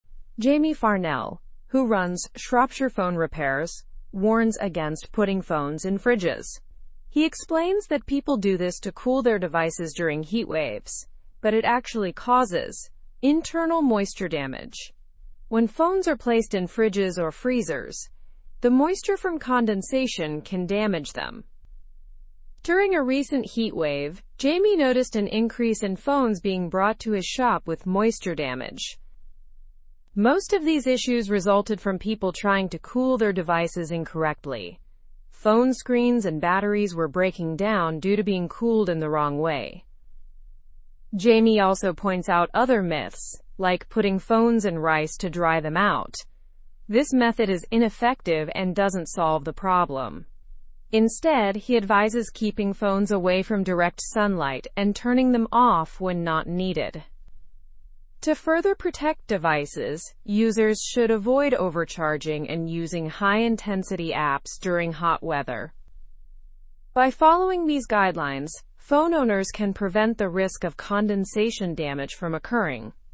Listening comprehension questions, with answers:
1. What does Jamie Farnell warn about?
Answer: Jamie Farnell warns against putting phones in fridges as it can cause moisture damage.

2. What problem did Jamie notice during the recent heatwave?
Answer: Jamie noticed an increase in phones with moisture damage due to improper cooling attempts.

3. What happens to phones cooled incorrectly?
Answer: Phones cooled incorrectly can have screens and batteries break down.

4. What common myth about drying phones does Jamie mention?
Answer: Jamie mentions the myth of putting phones in rice, which is ineffective.

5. What are Jamie's recommendations for phone care?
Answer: Jamie recommends keeping phones away from direct sunlight and turning them off when not needed.

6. How can users prevent condensation damage?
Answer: Users can prevent condensation damage by avoiding overcharging and high-intensity app usage in hot weather.

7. What is advised against during hot weather?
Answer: It is advised against using high-intensity apps and overcharging phones during hot weather.

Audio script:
Jamie Farnell, who runs Shropshire Phone Repairs, warns against putting phones in fridges. He explains that people do this to cool their devices during heatwaves, but it actually causes 'internal moisture damage'. When phones are placed in fridges or freezers, the moisture from condensation can damage them.
During a recent heatwave, Jamie noticed an increase in phones being brought to his shop with moisture damage. Most of these issues resulted from people trying to cool their devices incorrectly. Phone screens and batteries were breaking down due to being cooled in the wrong way.
Jamie also points out other myths, like putting phones in rice to dry them out. This method is ineffective and doesn't solve the problem. Instead, he advises keeping phones away from direct sunlight and turning them off when not needed.
To further protect devices, users should avoid overcharging and using high-intensity apps during hot weather. By following these guidelines, phone owners can prevent the risk of condensation damage from occurring.

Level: Level 3